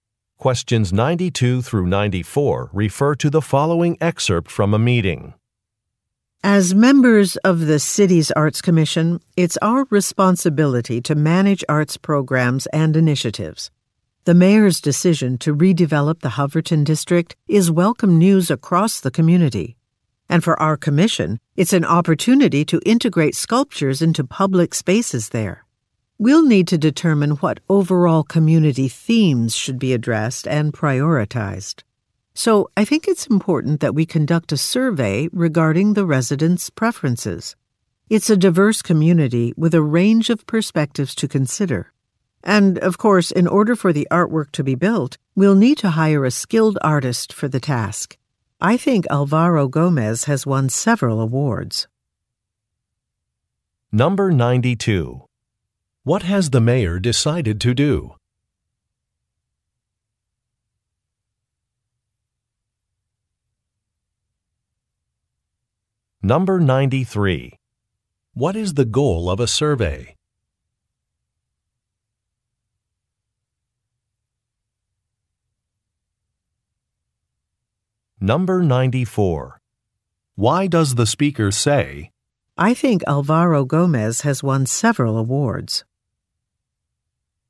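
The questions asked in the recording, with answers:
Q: What has the mayor decided to do?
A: Redevelop the Hoverton District

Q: What is the goal of a survey?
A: To learn residents' preferences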